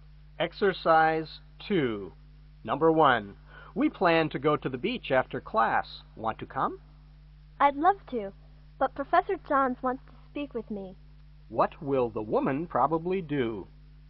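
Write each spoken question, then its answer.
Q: What will the woman probably do?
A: Go to see Professor Johns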